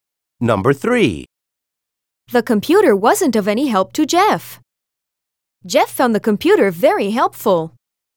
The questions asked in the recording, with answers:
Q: The computer wasn't of any help to Jeff. Jeff found the computer very helpful.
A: Different is the correct answer.